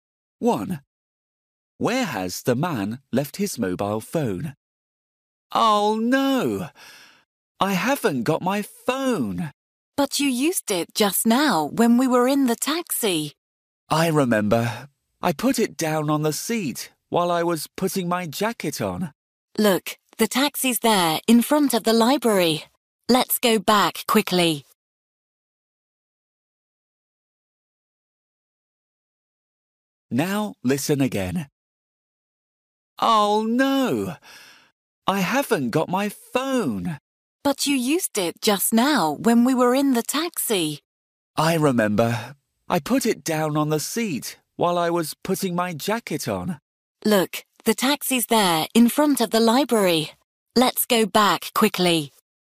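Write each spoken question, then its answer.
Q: Where has the man left his mobile phone?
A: On the seat in the taxi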